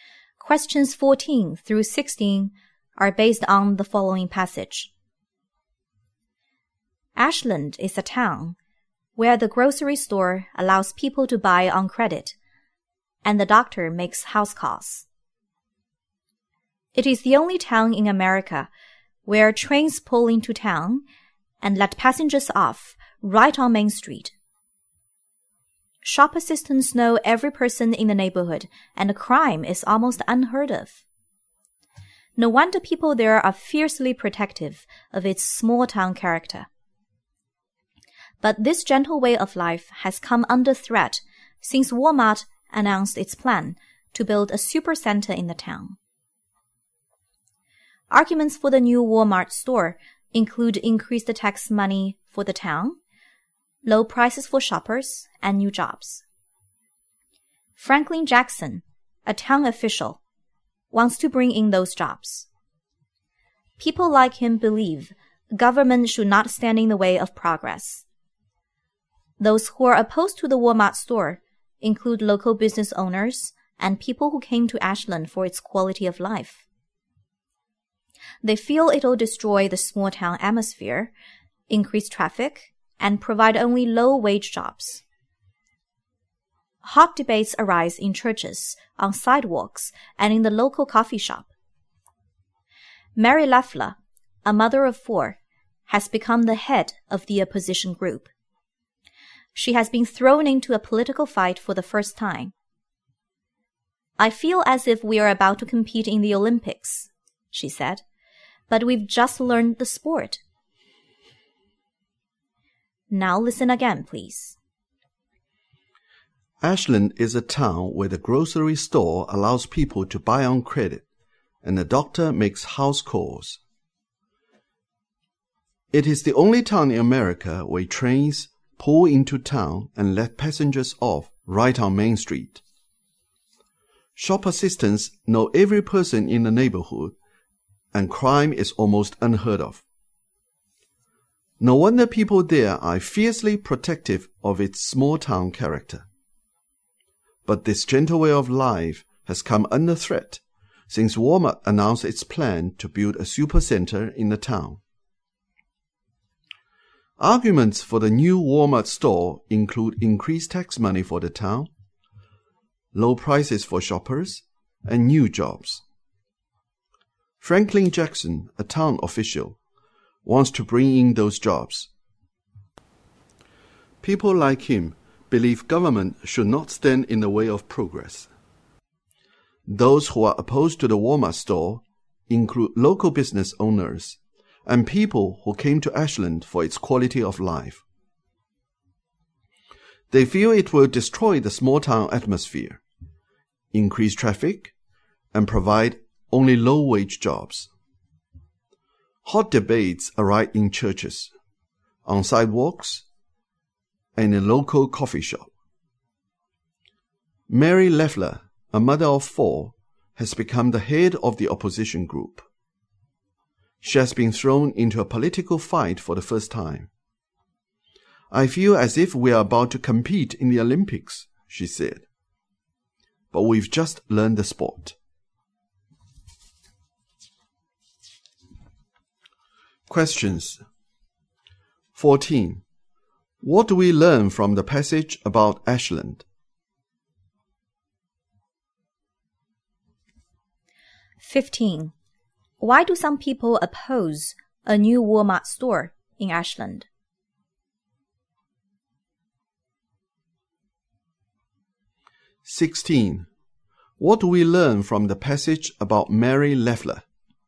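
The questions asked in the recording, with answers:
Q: Why do some people oppose a new Walmart store in Ashland?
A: It will destroy the small-town atmosphere, increase traffic and provide only low-wage jobs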